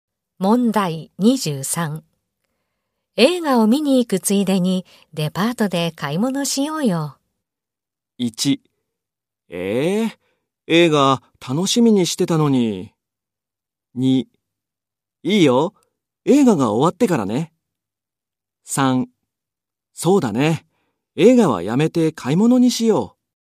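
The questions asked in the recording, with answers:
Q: 映画を見に行くついでにデパートで買い物しようよ。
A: 2: いいよ、映画が終わってからね。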